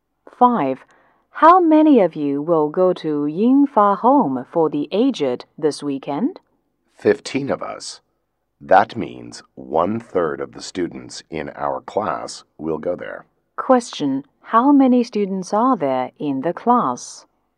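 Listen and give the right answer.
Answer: 45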